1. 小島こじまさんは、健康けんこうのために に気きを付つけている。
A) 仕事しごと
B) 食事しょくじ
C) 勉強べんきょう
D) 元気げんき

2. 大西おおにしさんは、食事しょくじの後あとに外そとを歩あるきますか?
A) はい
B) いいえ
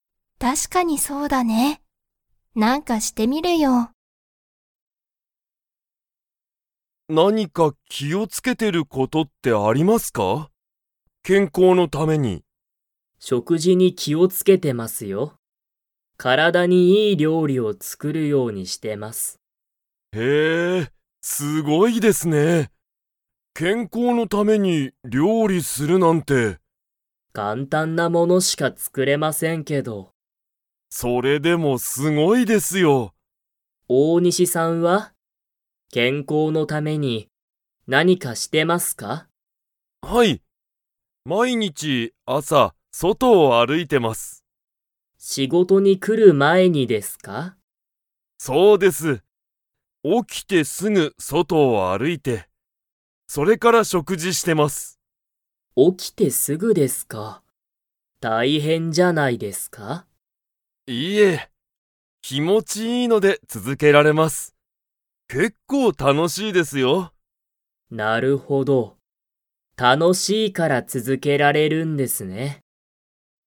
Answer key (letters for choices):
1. B
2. B

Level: Level 3